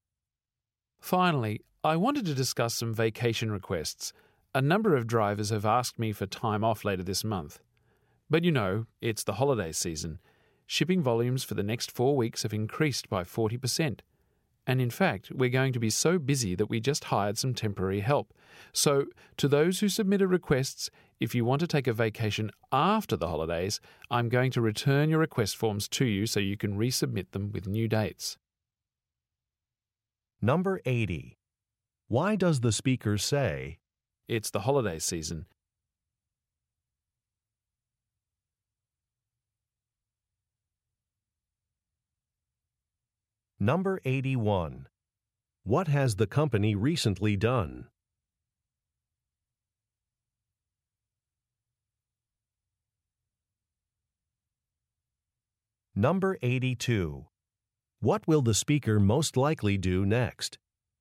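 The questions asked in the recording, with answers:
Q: Why does the speaker say, "It's the holiday season"?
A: To explain why the vacation requests can't be approved: the weeks ahead are very busy

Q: What has the company recently done?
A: Hired some temporary help

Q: What will the speaker most likely do next?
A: Return the request forms so they can be resubmitted with new dates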